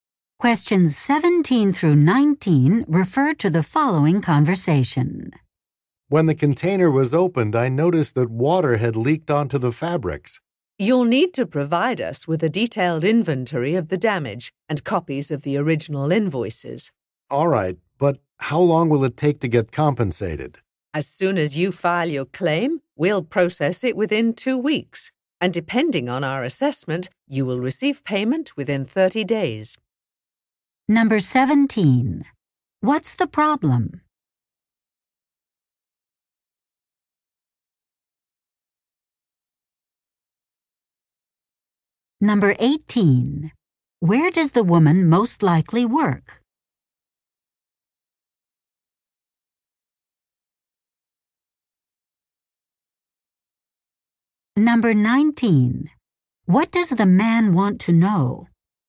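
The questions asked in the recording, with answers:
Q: What's the problem?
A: Water leaked onto the fabrics in the container

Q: What does the man want to know?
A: How long it will take to get compensated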